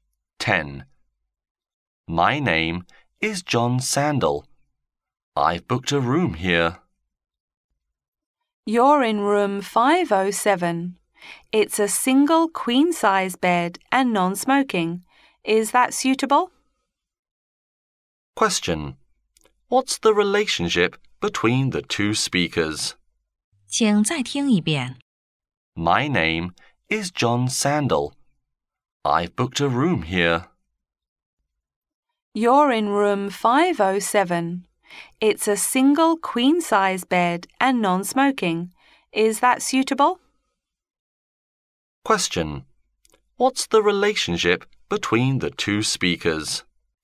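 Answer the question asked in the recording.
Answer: Hotel receptionist and guest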